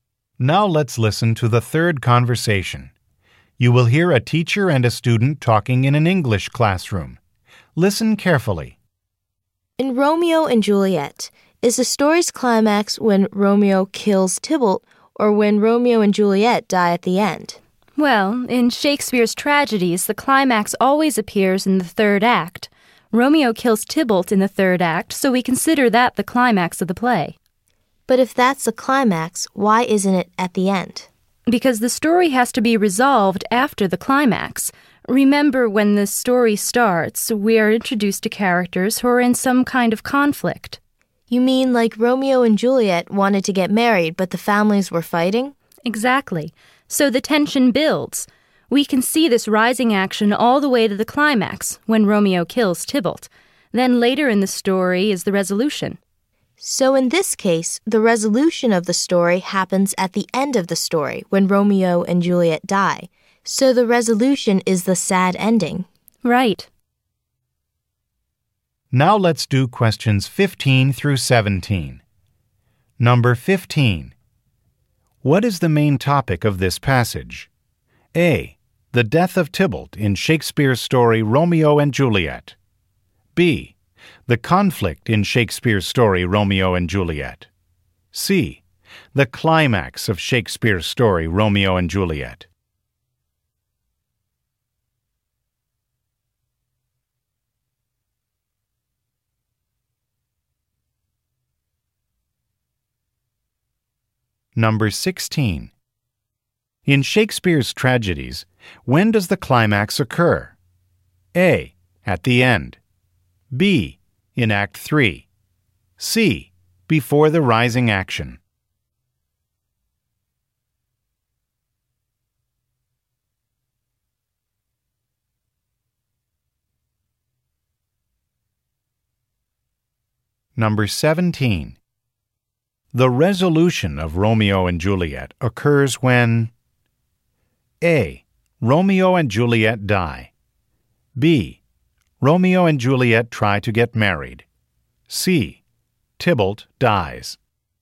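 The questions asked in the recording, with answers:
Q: What is the main topic of this passage?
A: C: The climax of Shakespeare's story Romeo and Juliet.

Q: In Shakespeare's tragedies, when does the climax occur?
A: B: In Act 3.

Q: The resolution of Romeo and Juliet occurs when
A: A: Romeo and Juliet die.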